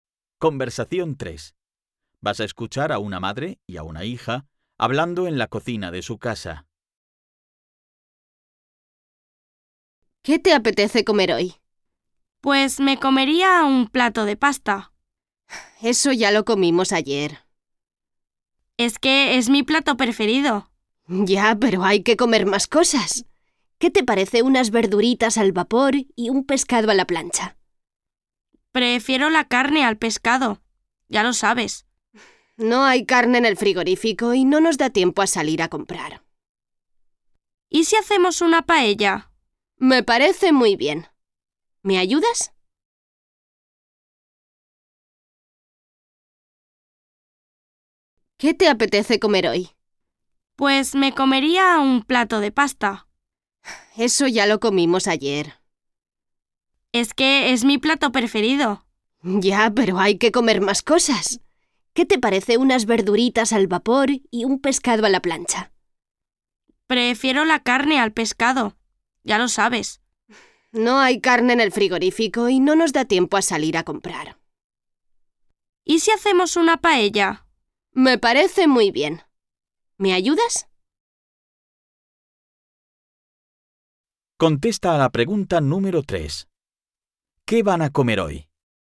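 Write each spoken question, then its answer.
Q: ¿Qué van a comer hoy?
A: Paella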